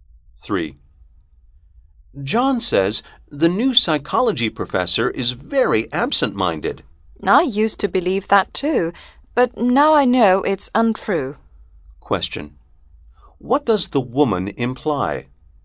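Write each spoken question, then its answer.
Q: What does the woman imply?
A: The new psychology professor is not absent-minded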